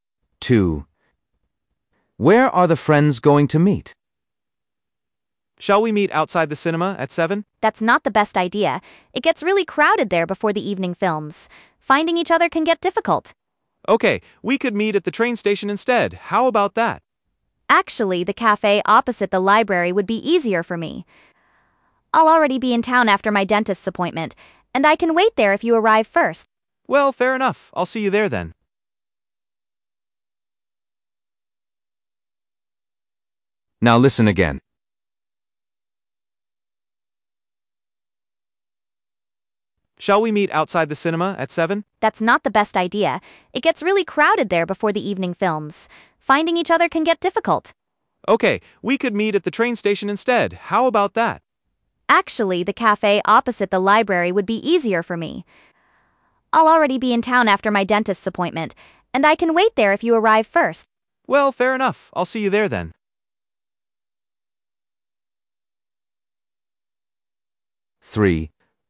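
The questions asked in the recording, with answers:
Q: Where are the friends going to meet?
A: at the cafe opposite the library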